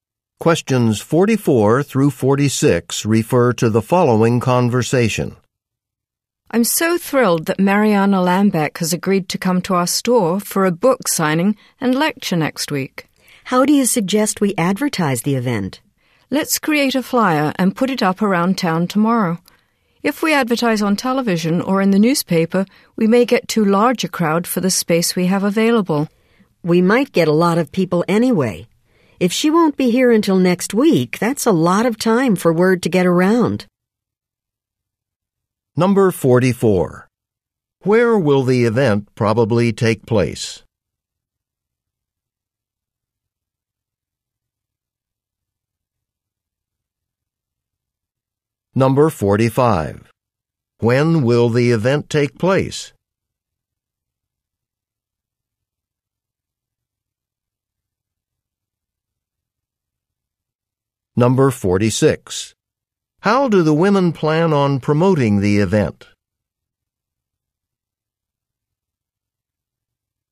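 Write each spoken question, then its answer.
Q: Where will the event probably take place?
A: At their store (a bookstore)

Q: When will the event take place?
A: Next week

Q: How do the women plan on promoting the event?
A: With flyers around town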